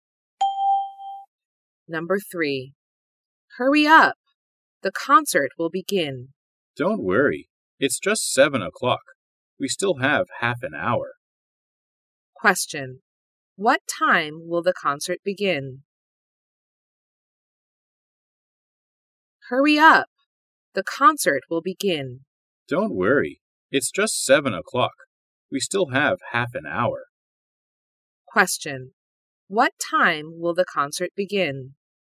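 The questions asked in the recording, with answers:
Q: What time will the concert begin?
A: At 7:30.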